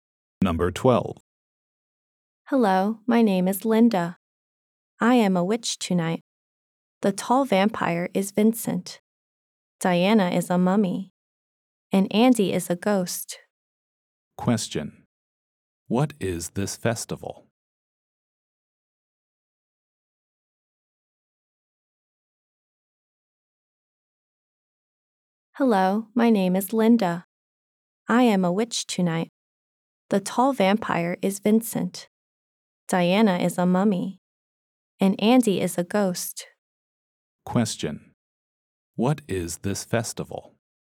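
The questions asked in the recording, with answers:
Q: What is this festival?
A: Halloween.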